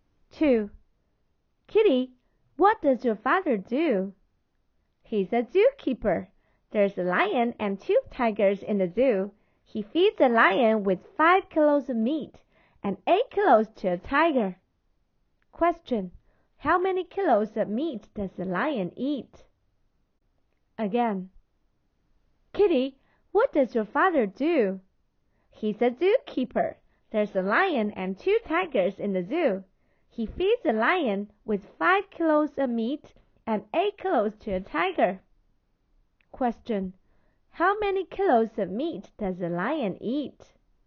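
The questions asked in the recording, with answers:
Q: How many kilos of meat does the lion eat?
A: 5 kilos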